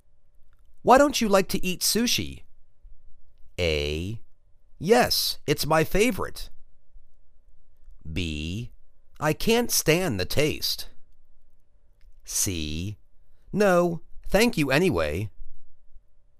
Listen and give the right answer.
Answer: I can't stand the taste.